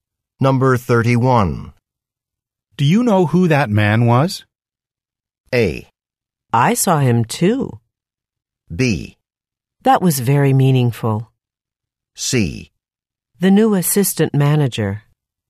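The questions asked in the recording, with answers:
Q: Do you know who that man was?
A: C: The new assistant manager.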